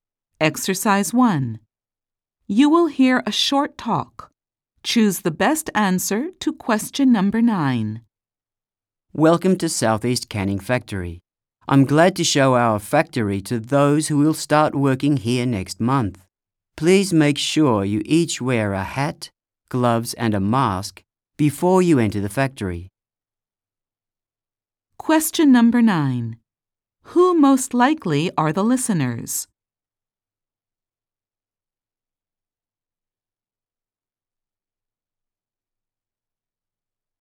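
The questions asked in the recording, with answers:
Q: Who most likely are the listeners?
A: New employees who will start working at the factory next month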